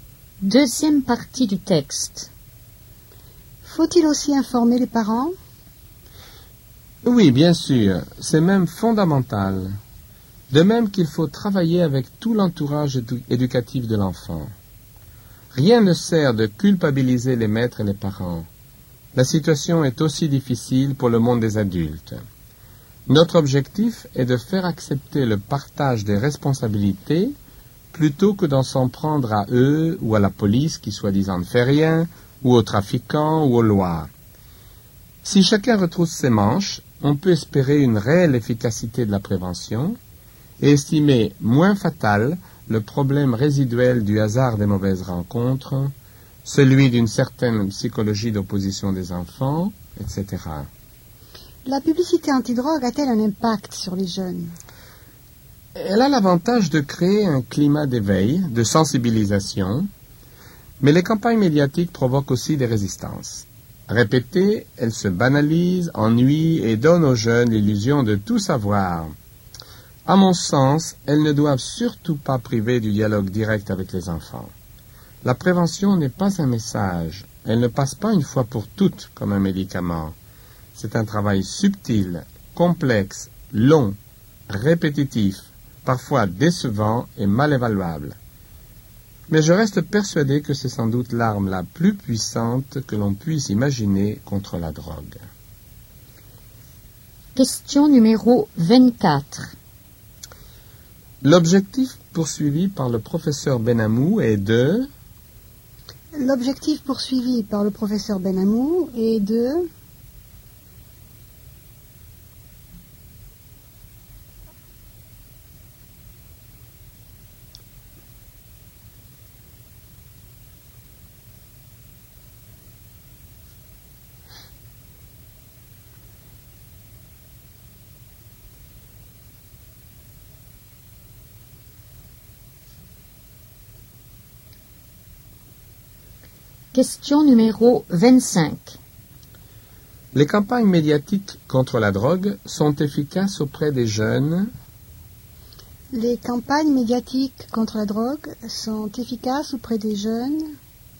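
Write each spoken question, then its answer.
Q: L'objectif poursuivi par le professeur Benhamou est de...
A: faire accepter le partage des responsabilités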